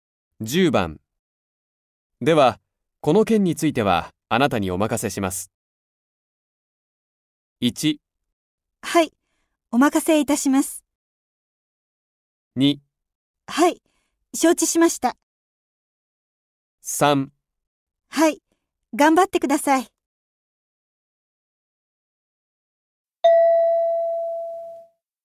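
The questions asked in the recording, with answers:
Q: では、この件については、あなたにお任せします。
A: 2: はい、承知しました。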